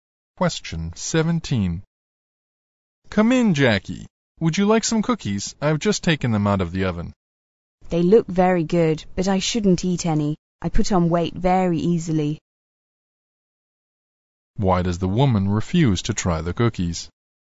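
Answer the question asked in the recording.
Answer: She puts on weight easily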